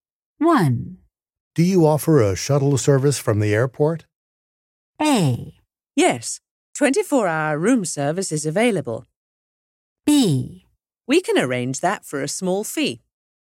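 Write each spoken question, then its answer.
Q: Do you offer a shuttle service from the airport?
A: B: We can arrange that for a small fee.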